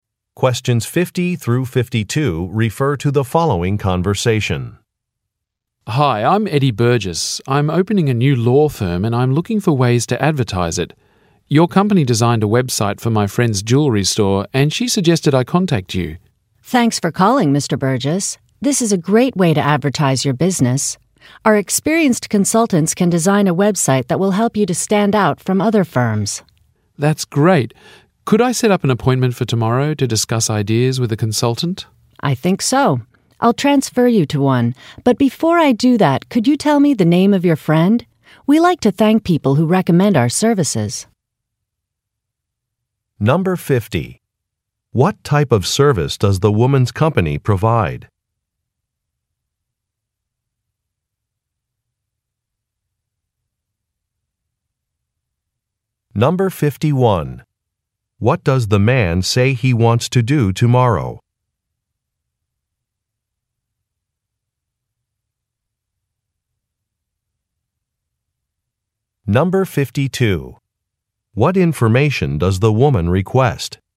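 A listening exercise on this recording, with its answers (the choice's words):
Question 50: What type of service does the woman's company provide?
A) Career counseling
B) Home improvement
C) Garden landscaping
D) Web site design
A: Web site design

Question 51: What does the man say he wants to do tomorrow?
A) Make a payment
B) Review a document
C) Redecorate an office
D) Meet with a consultant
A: Meet with a consultant

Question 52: What information does the woman request?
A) The size of a room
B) The name of the man's friend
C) The number of people in a group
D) The start date of renovations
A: The name of the man's friend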